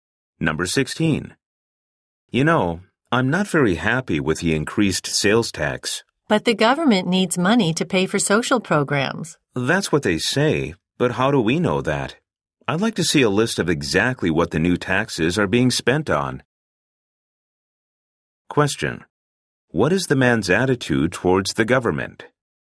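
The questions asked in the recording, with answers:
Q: What is the man's attitude towards the government?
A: Skeptical; he doubts how the tax money is spent.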